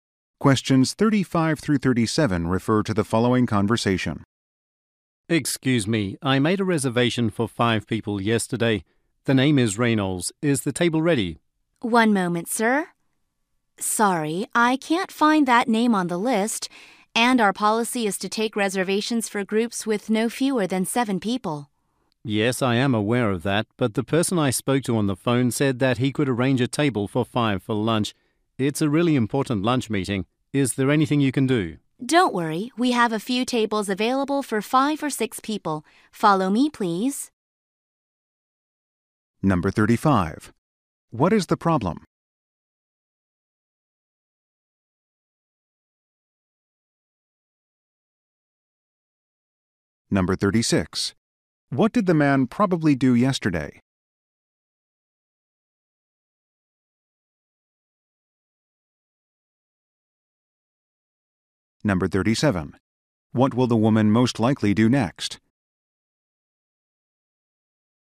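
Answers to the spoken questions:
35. The man's reservation is not on the list
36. He made a reservation for 5 people
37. Take the man to a table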